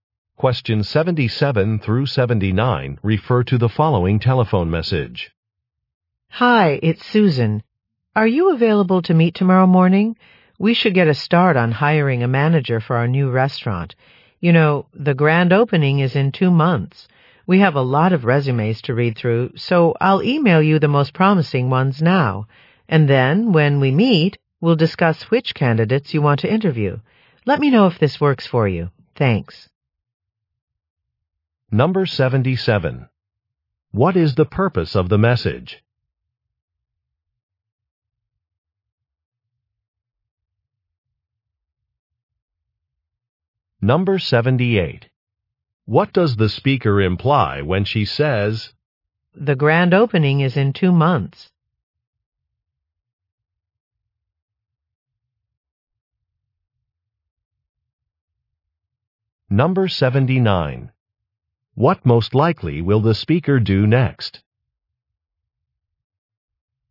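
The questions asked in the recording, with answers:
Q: What is the purpose of the message?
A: To arrange a meeting about hiring a restaurant manager

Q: What most likely will the speaker do next?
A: Email the best resumes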